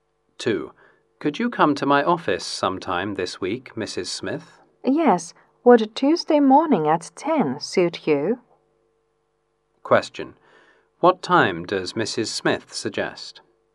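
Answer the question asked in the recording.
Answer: Tuesday morning at 10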